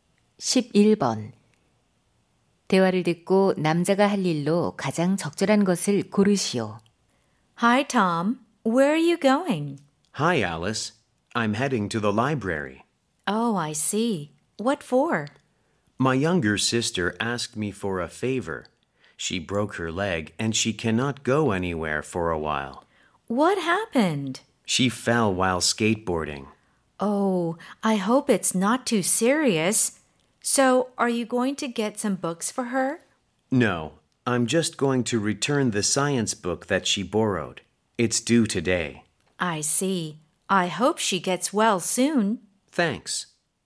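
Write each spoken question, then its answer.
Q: 대화를 듣고 남자가 할 일로 가장 적절한 것을 고르시오.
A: 도서관에 여동생의 과학책 반납하기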